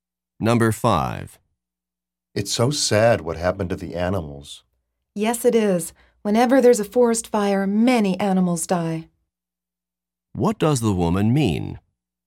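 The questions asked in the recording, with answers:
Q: What does the woman mean?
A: Many animals die whenever there's a forest fire.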